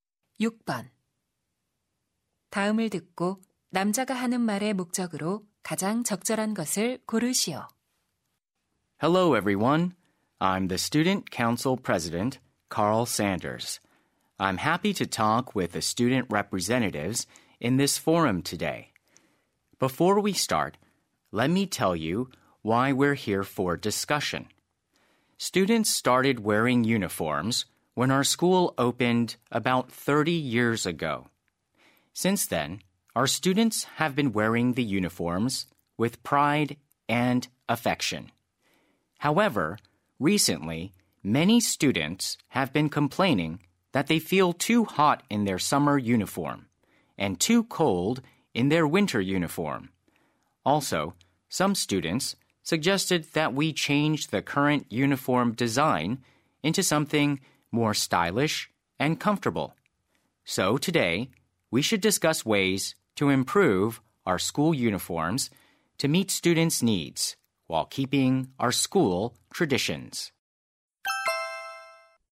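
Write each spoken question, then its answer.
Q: 다음을 듣고 남자가 하는 말의 목적으로 가장 적절한 것을 고르시오.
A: 교복 개선 방안 토론의 취지를 설명하려고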